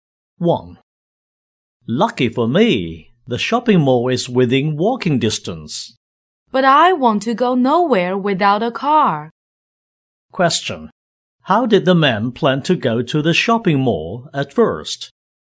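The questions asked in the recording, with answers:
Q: How did the man plan to go to the shopping mall at first?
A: By car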